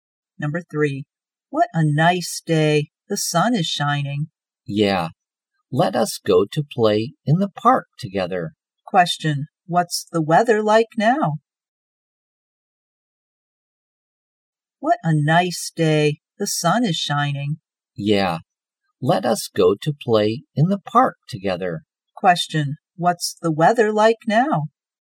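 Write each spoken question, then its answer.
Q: what's the weather like now?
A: sunny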